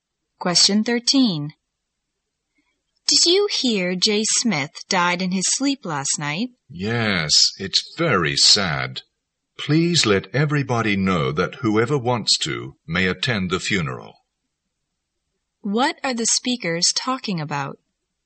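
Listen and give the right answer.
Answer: Jay Smith's death and funeral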